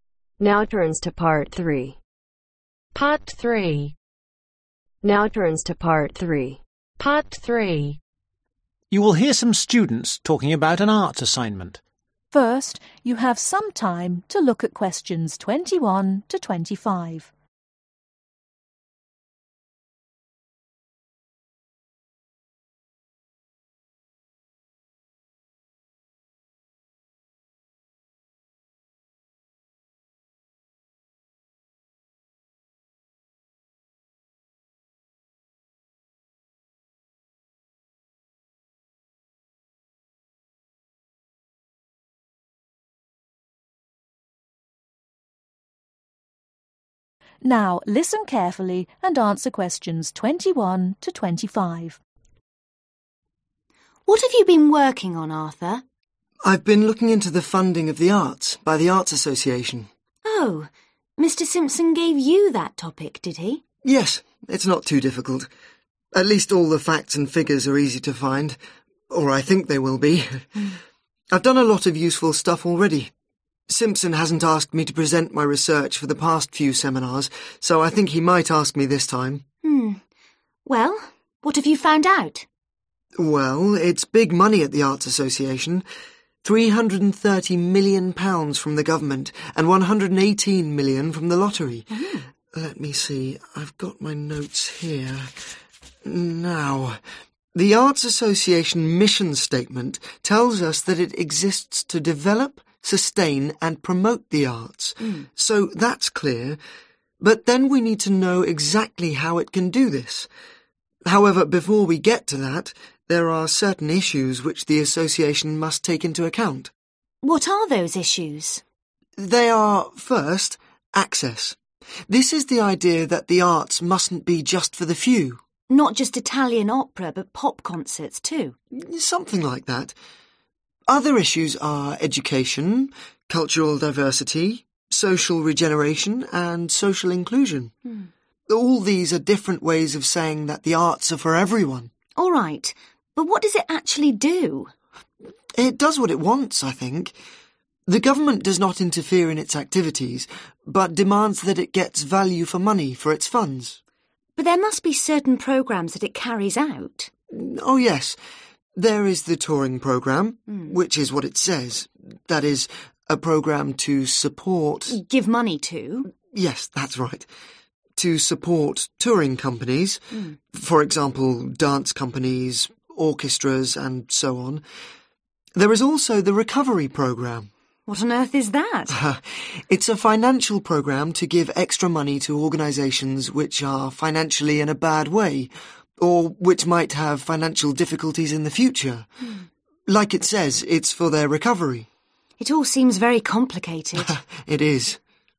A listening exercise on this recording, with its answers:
Complete the notes below. Write ONE WORD OR A NUMBER for each answer.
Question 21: The Arts Association receives & (21) ............ million from the government.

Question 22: The first issue the Arts association tries to address is (22) ............ .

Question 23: All the issues mean that the arts are for (23) ............ .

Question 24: The government wants value for (24) ............ in return for its contribution.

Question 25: The (25) ............ program helps organizations with financial problems.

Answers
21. 330
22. access
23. everyone
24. money
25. recovery